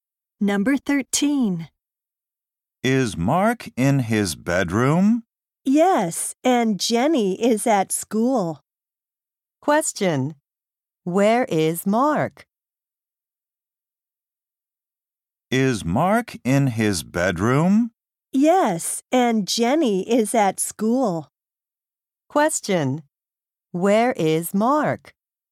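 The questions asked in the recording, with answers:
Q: Question. Where is Mark?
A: In his bedroom.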